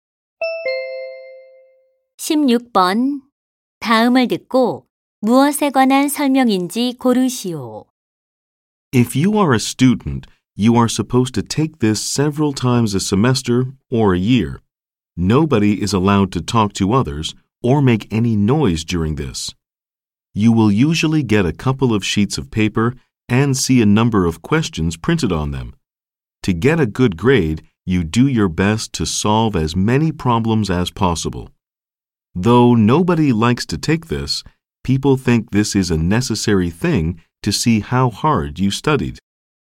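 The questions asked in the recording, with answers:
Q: 다음을 듣고 무엇에 관한 설명인지 고르시오.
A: 시험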